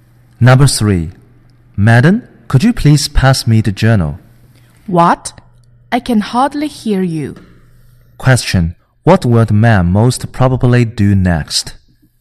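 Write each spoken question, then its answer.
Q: What will the man most probably do next?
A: Repeat his request more loudly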